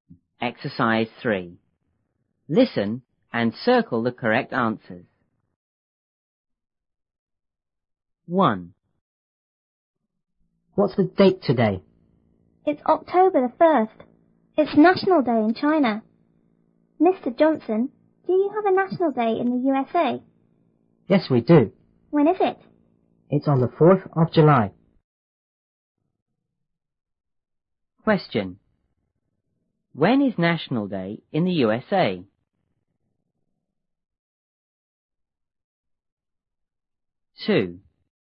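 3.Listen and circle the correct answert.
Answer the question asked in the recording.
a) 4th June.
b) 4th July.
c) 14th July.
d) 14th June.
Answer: b) 4th July.

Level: 初中英语广州版1B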